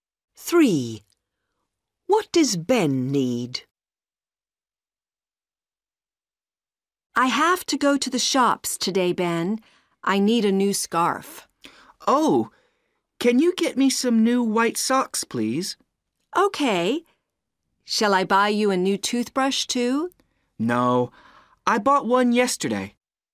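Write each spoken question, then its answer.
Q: What does Ben need?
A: New white socks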